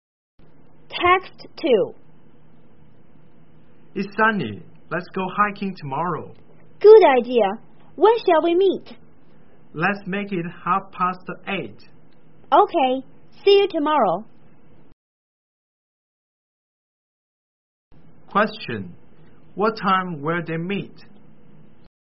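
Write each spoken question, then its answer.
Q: What time will they meet?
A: At 8:30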